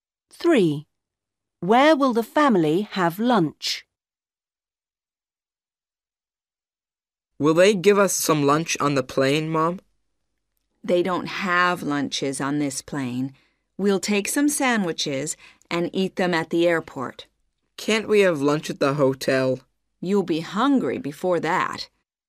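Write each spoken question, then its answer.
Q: Where will the family have lunch?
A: at the airport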